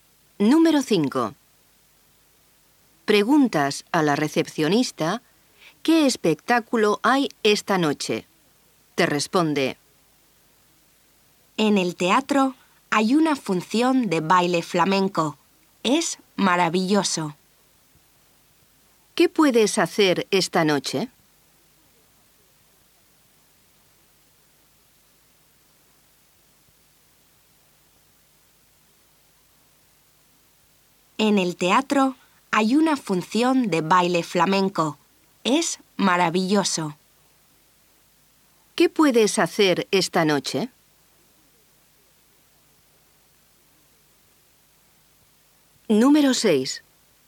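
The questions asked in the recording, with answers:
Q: ¿Qué puedes hacer esta noche?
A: Ver una función de baile flamenco en el teatro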